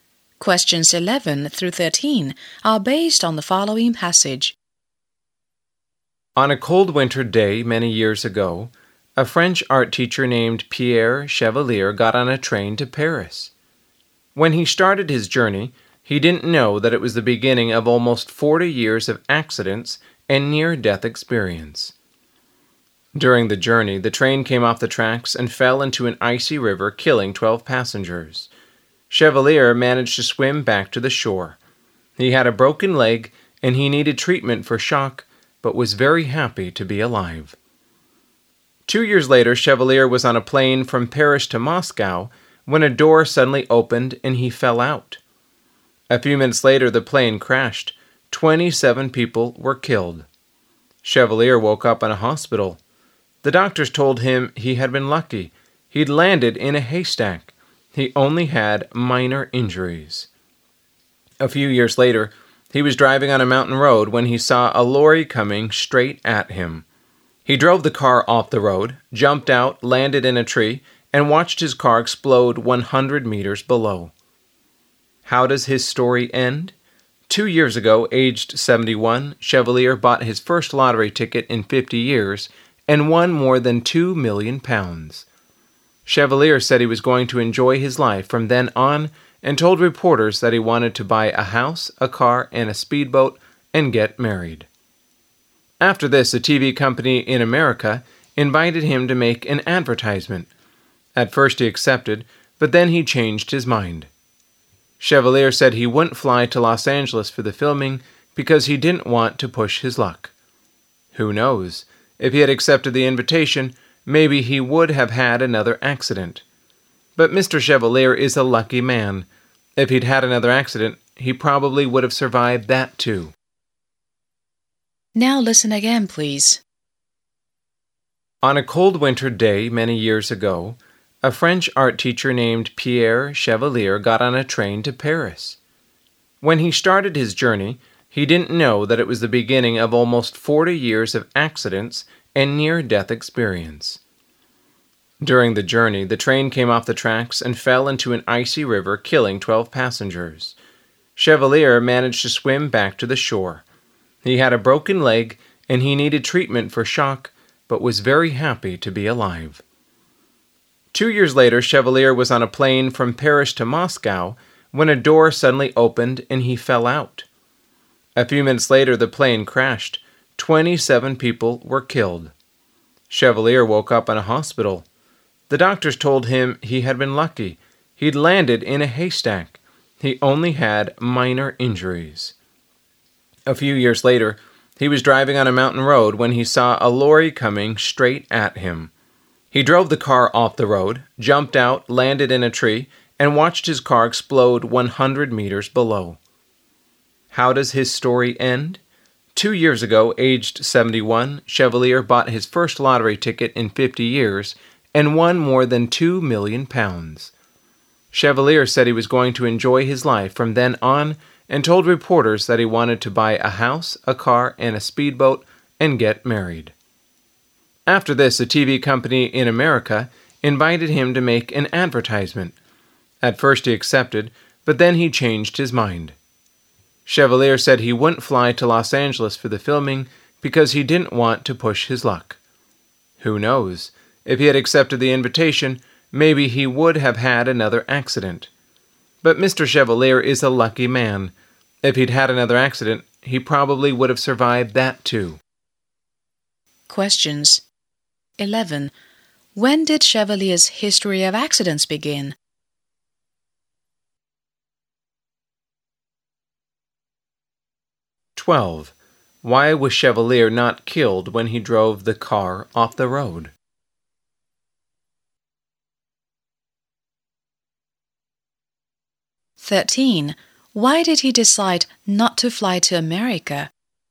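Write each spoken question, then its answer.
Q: When did Chevalier's history of accidents begin?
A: On a cold winter day when he took a train to Paris

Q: Why was Chevalier not killed when he drove the car off the road?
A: He jumped out and landed in a tree

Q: Why did he decide not to fly to America?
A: He didn't want to push his luck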